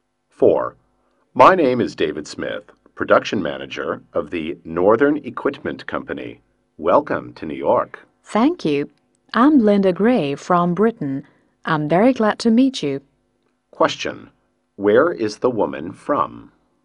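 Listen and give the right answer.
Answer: Britain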